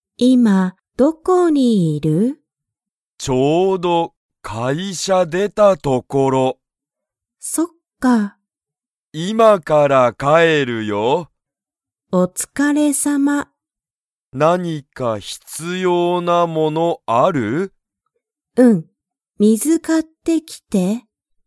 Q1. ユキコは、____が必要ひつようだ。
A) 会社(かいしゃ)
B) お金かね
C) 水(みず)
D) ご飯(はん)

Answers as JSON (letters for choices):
{"1": "C"}

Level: Level 1